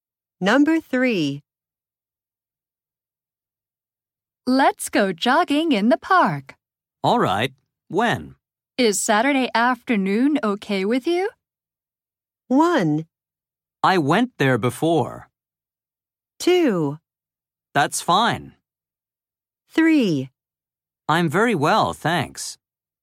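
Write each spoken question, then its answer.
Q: Is Saturday afternoon okay with you?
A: 2: That's fine.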